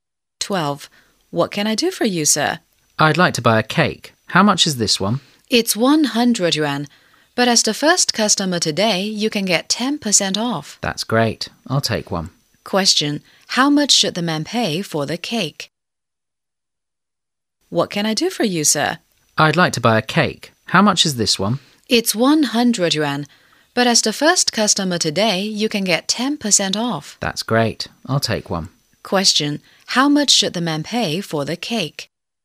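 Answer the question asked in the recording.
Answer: 90 yuan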